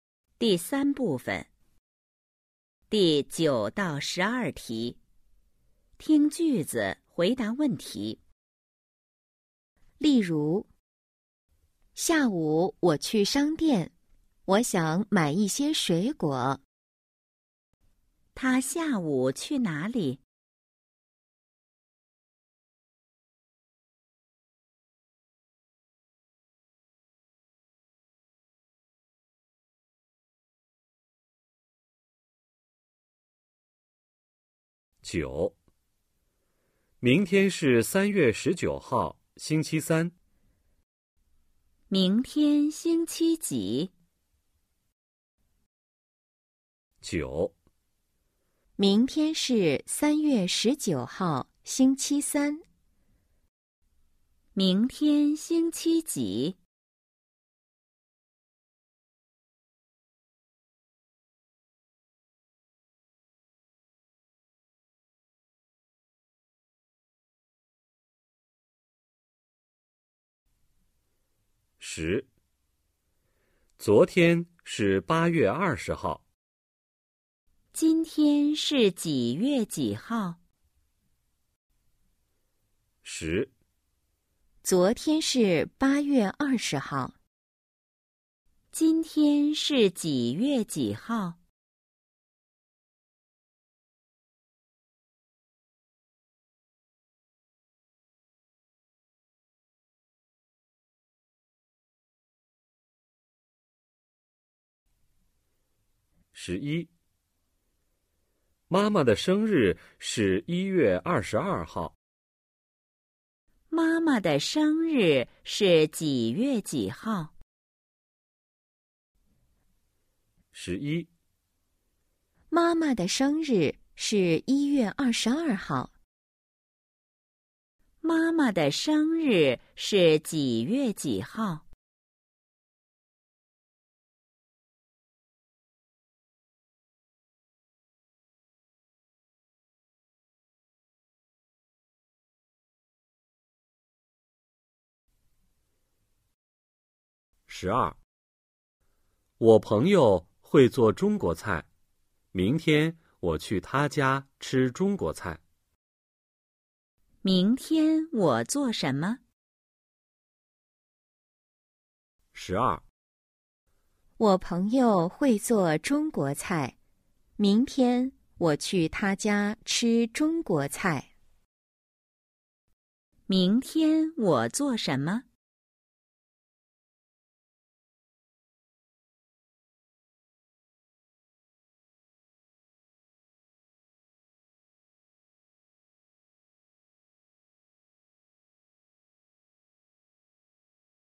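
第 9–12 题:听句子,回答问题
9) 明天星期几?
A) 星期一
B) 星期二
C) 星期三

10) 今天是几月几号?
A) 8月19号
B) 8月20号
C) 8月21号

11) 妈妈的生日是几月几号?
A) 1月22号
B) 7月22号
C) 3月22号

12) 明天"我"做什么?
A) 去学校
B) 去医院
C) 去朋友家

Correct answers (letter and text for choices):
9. C) 星期三
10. C) 8月21号
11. A) 1月22号
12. C) 去朋友家

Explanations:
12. 我朋友会做中国菜,明天我去他家吃中国菜。

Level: HSK 1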